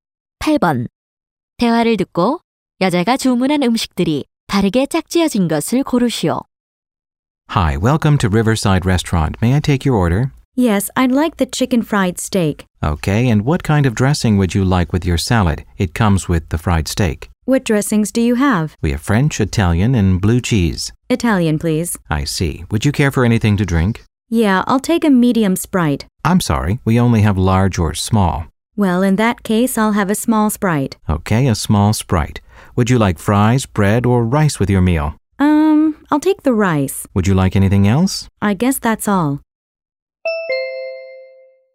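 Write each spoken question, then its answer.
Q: 대화를 듣고 여자가 주문한 음식들이 바르게 짝지어진 것을 고르시오.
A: 치킨 프라이드 스테이크(이탈리안 드레싱 샐러드), 작은 스프라이트, 밥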